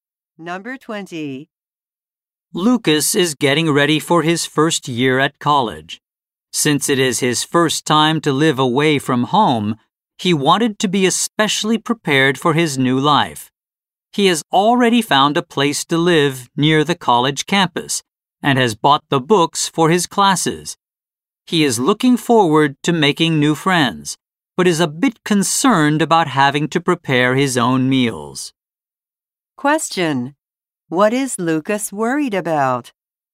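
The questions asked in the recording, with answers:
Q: What is Lucas worried about?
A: Having to prepare his own meals.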